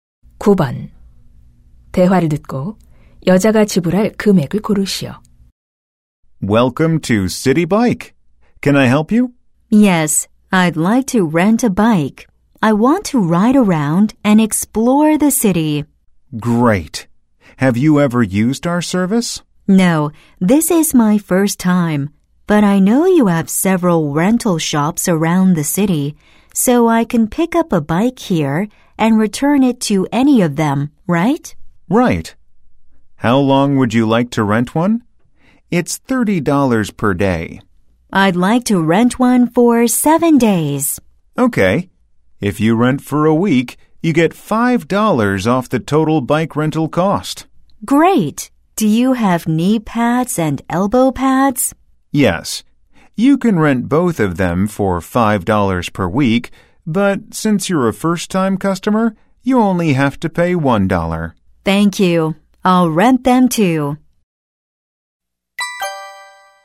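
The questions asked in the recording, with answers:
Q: 대화를 듣고 여자가 지불할 금액을 고르시오.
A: $206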